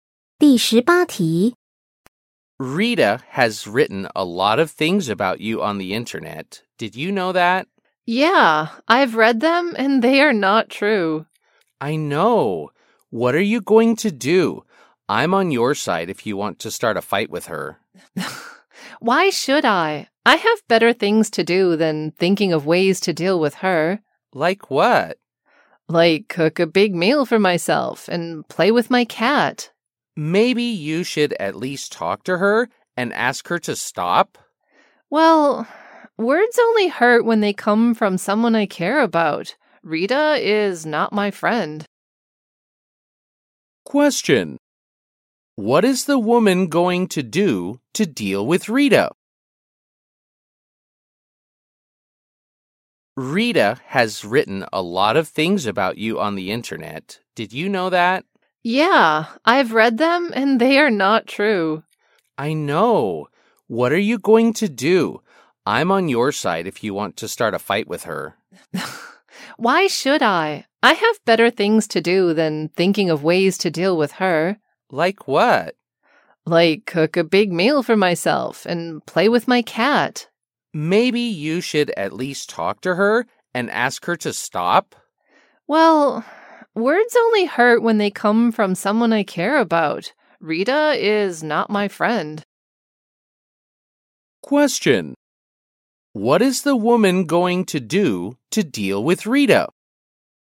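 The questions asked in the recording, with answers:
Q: What is the woman going to do to deal with Rita?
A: Nothing; she will ignore her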